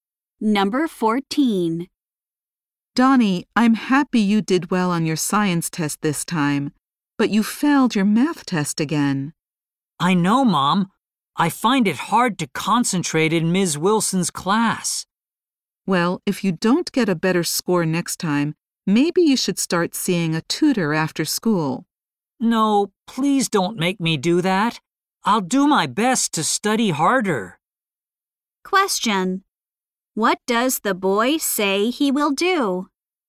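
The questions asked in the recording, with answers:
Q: What does the boy say he will do?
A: Study harder.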